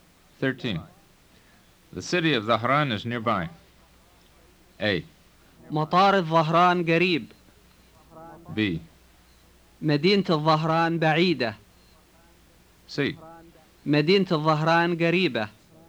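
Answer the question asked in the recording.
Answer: C: مدينة الظهران قريبة.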